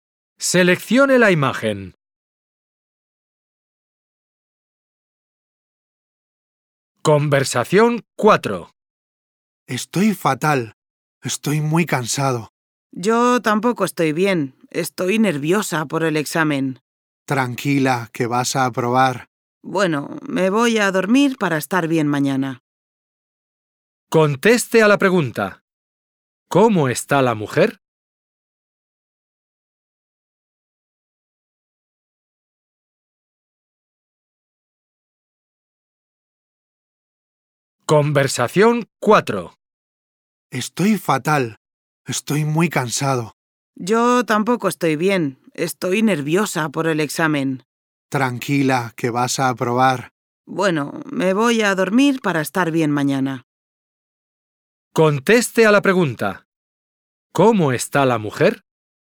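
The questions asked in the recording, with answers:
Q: ¿Cómo está la mujer?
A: Nerviosa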